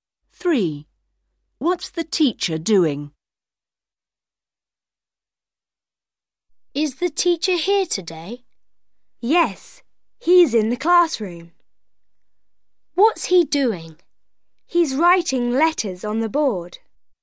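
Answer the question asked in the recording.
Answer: Writing letters on the board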